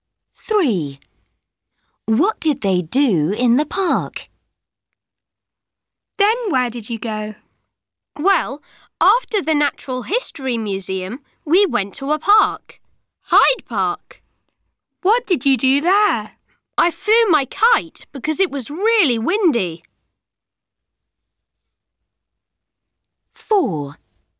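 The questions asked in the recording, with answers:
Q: What did they do in the park?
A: Flew a kite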